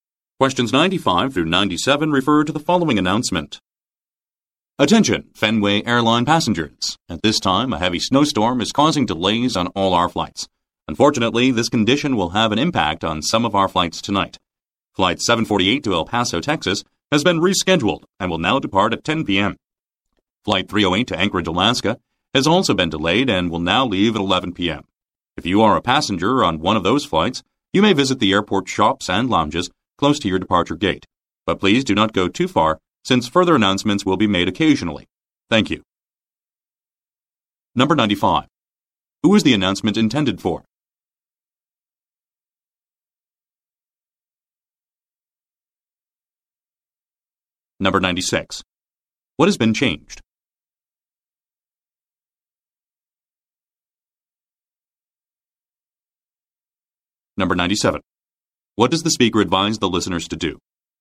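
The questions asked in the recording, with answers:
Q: Who is the announcement intended for?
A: Fenway Airline passengers

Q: What has been changed?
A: Flight departure times

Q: What does the speaker advise the listeners to do?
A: Stay near their departure gate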